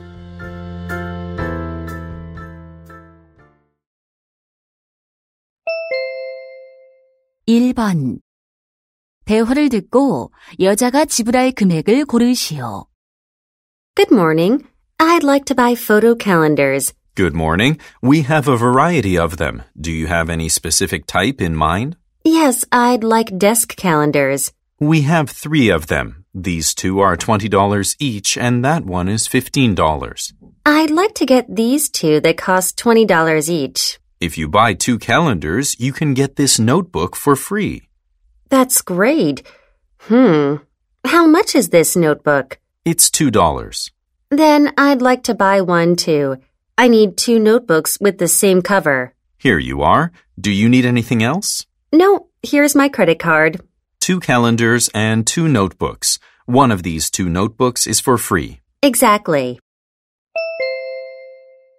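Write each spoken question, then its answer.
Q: 대화를 듣고 여자가 지불할 금액을 고르시오.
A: $42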